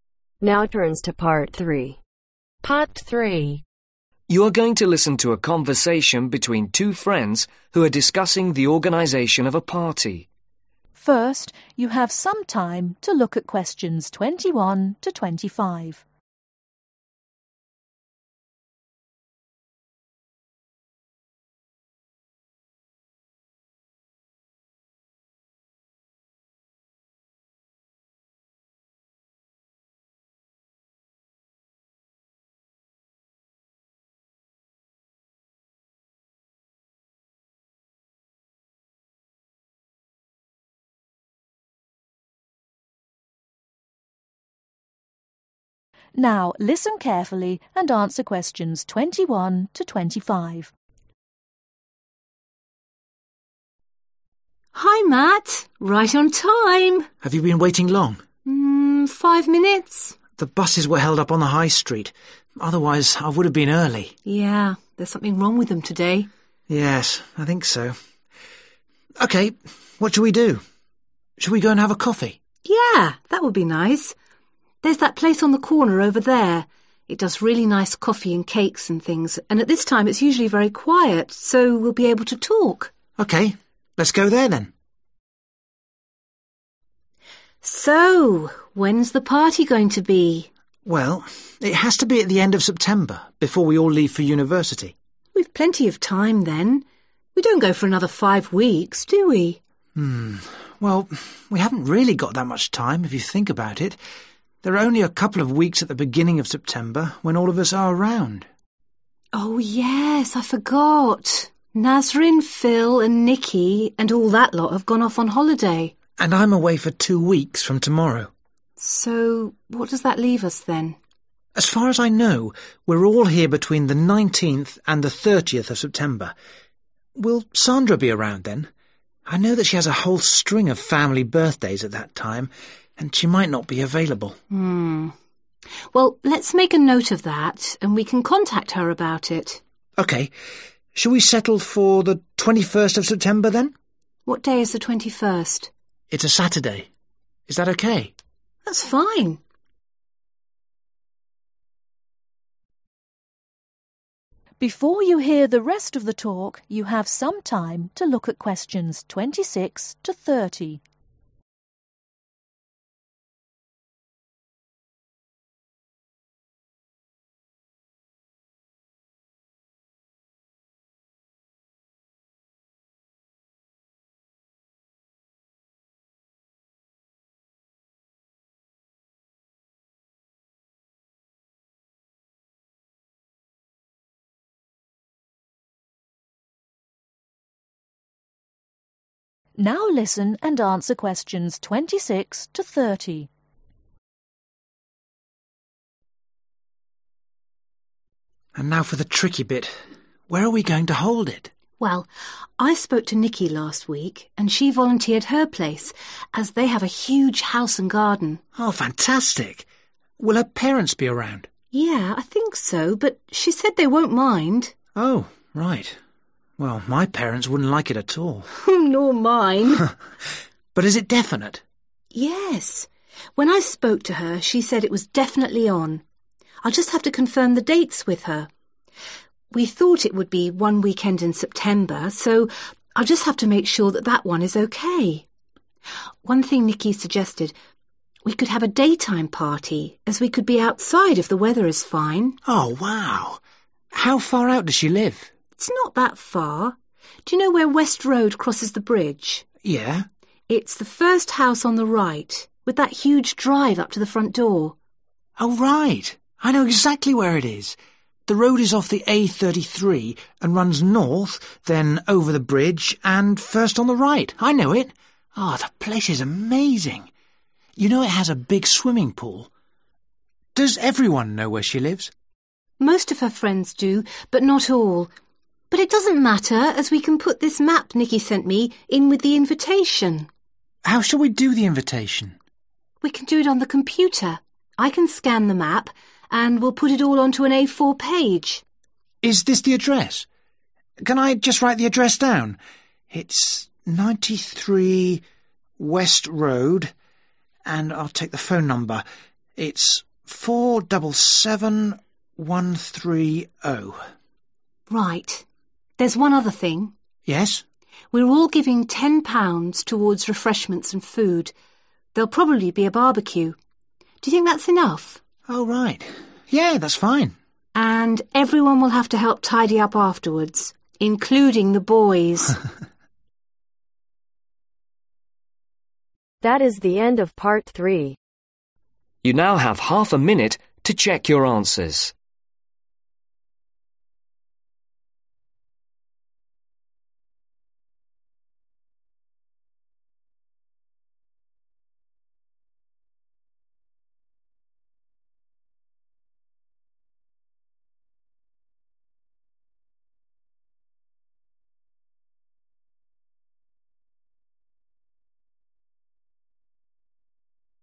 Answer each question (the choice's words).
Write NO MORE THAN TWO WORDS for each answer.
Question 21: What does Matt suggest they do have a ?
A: coffee

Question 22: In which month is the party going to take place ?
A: September

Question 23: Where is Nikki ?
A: on holiday

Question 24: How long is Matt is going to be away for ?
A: two weeks

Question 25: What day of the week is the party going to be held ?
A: Saturday

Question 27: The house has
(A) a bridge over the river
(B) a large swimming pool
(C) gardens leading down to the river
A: a large swimming pool

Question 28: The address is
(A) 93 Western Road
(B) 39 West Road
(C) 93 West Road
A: 93 West Road

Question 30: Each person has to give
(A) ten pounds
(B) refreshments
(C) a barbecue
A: ten pounds